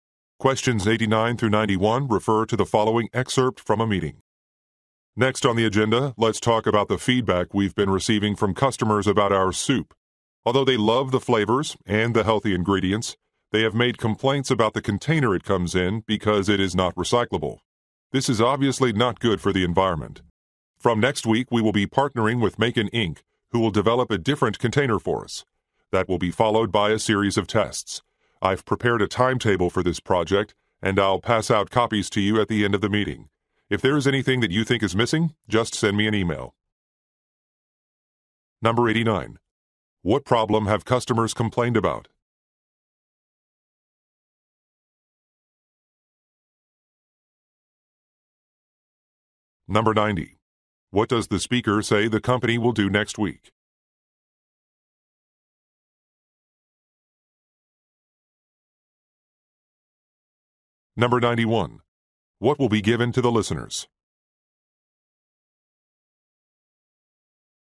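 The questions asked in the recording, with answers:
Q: What problem have customers complained about?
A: The soup container is not recyclable

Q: What does the speaker say the company will do next week?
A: Start working with Macon Inc. on a new container

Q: What will be given to the listeners?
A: A project timetable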